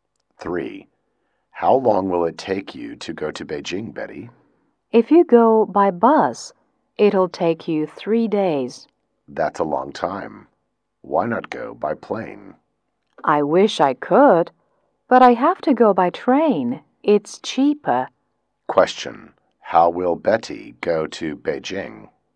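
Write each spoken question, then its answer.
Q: how will Betty go to Beijing?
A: By train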